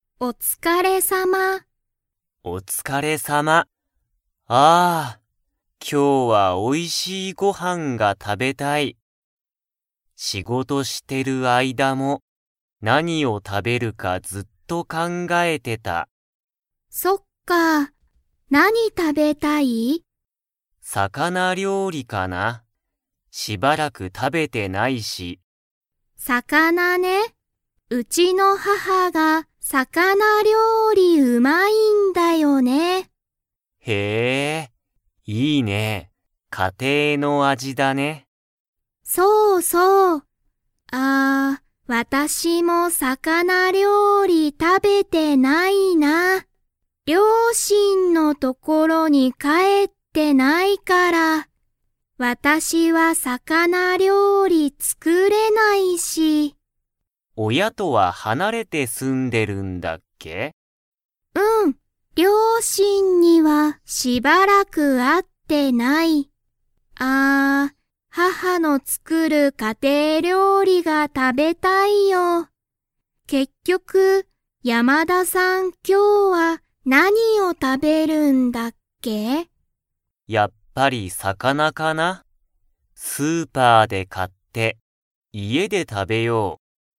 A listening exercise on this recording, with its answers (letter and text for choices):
Comprehension Quiz (Skip if you don't understand the conversation yet)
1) 魚料理さかなりょうりがうまいのは、誰だれですか?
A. ヤマダさん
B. サトウさん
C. ヤマダさんの父ちち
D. サトウさんの母はは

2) サトウさんは、両親りょうしんの所ところに 。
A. 最近さいきん帰かえった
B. しばらく帰かえっていない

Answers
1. D. サトウさんの母はは
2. B. しばらく帰かえっていない

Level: Level 3